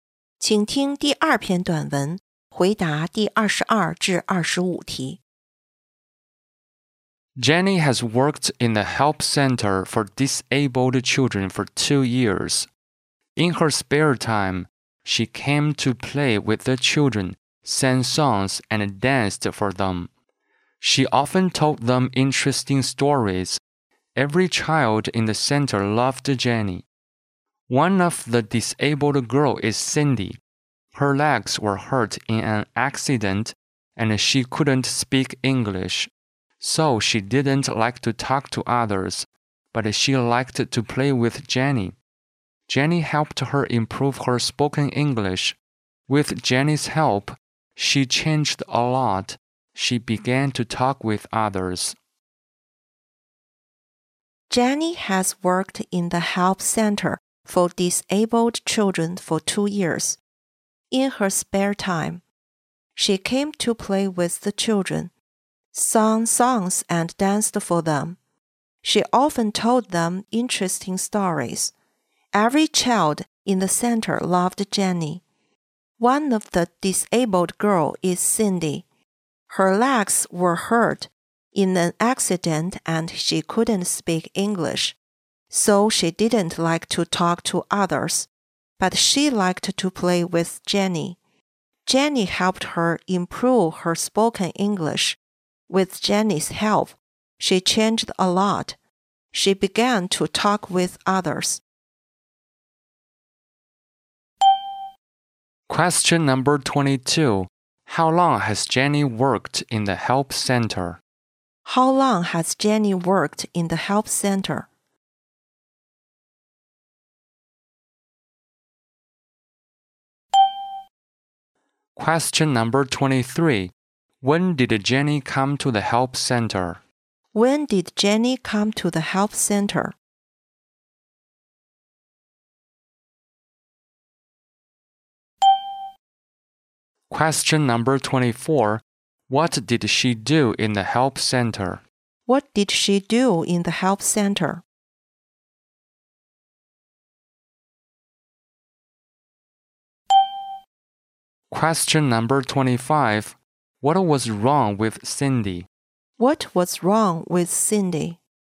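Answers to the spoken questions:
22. For 2 years
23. In her spare time
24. Played with the children, sang songs, danced and told stories
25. Her legs were hurt in an accident (and she couldn't speak English)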